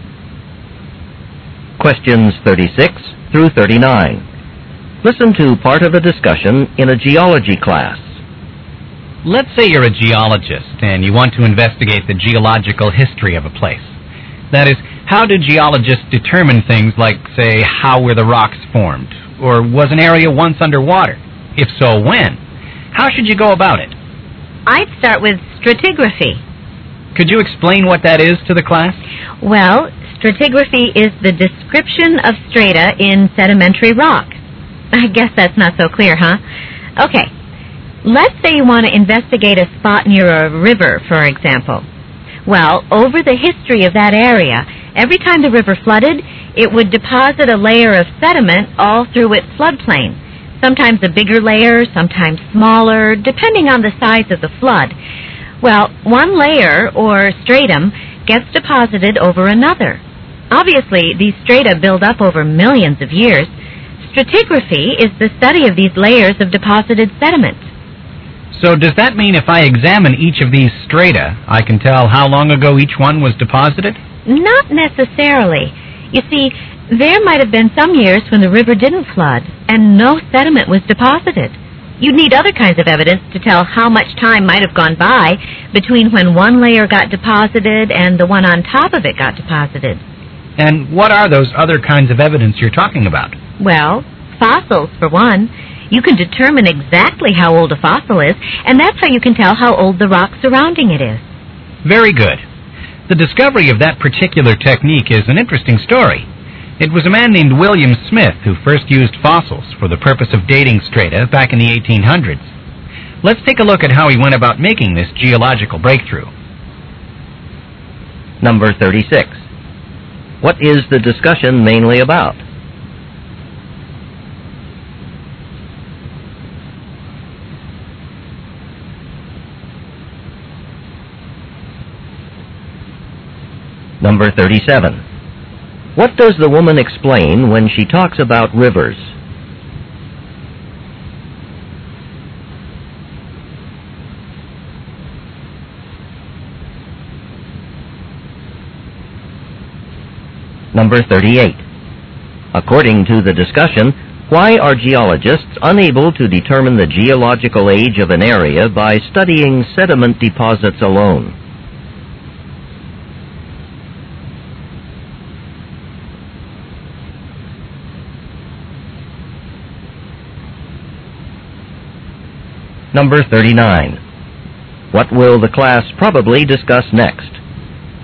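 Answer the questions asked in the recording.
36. How geologists determine the geological history of an area (stratigraphy)
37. How layers of sediment are deposited by floods
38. Sediment may not have been deposited every year
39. How William Smith used fossils to date strata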